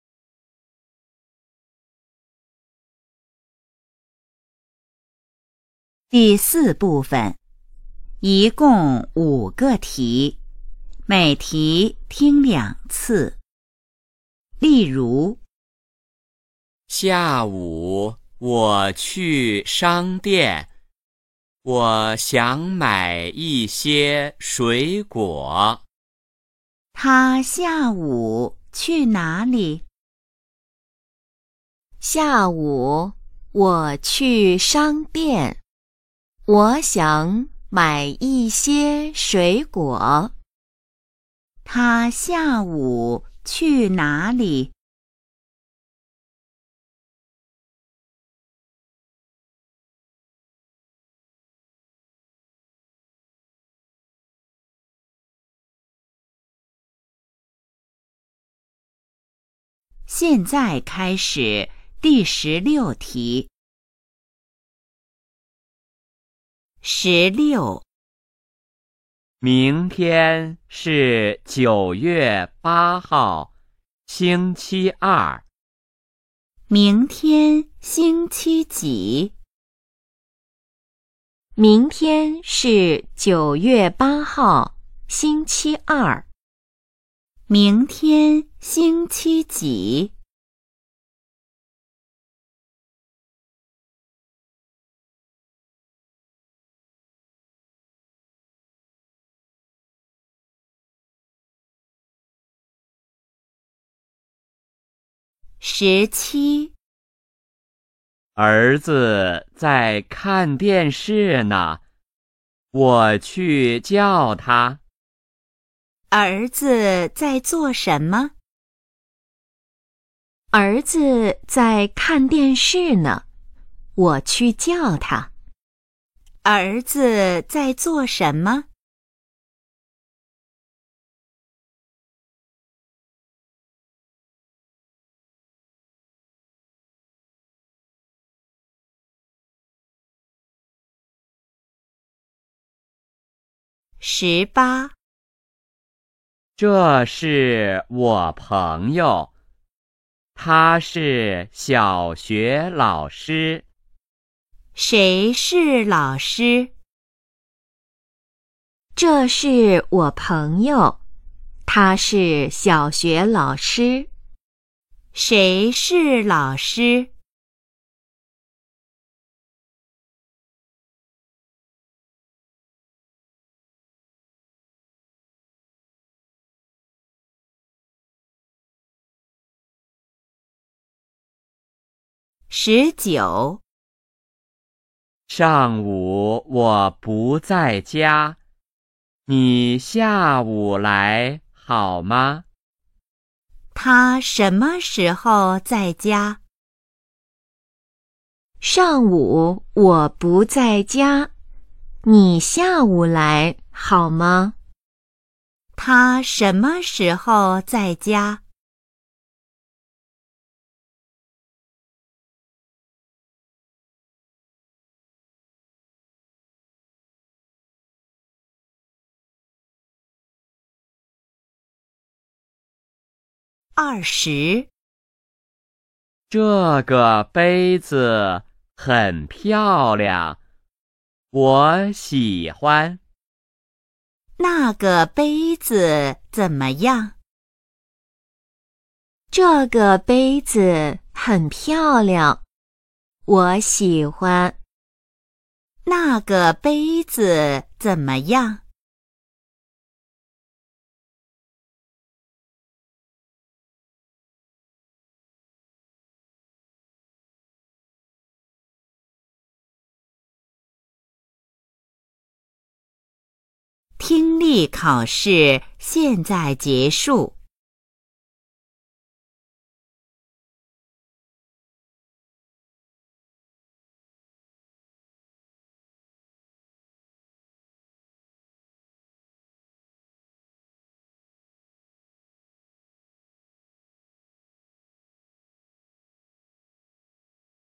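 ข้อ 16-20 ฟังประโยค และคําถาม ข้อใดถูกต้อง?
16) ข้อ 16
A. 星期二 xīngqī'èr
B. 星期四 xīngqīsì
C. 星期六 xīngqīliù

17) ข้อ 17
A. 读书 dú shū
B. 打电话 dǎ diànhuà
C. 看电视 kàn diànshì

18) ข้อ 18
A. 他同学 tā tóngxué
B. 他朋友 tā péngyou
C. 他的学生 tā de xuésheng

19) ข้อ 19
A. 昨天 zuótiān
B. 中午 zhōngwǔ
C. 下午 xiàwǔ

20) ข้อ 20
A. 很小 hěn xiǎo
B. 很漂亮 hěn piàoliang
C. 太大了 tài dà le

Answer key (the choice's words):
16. 星期二 xīngqī'èr
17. 看电视 kàn diànshì
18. 他朋友 tā péngyou
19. 下午 xiàwǔ
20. 很漂亮 hěn piàoliang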